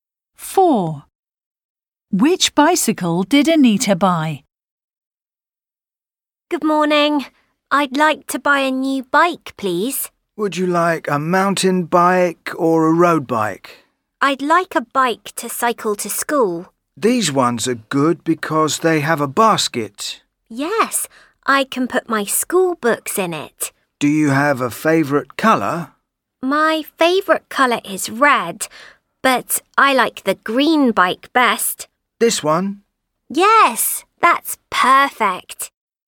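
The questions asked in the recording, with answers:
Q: Which bicycle did Anita buy?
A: the green bike with a basket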